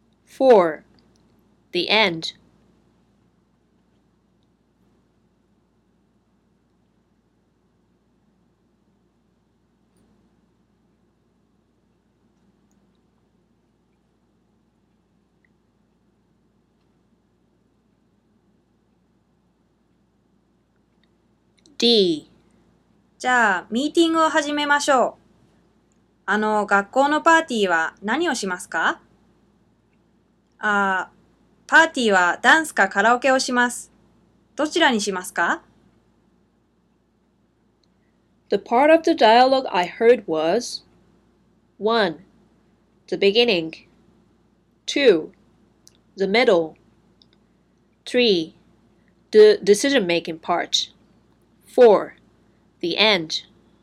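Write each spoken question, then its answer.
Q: The part of the dialogue I heard was 1. The beginning 2. The middle 3. The decision-making part 4. The end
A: 1: The beginning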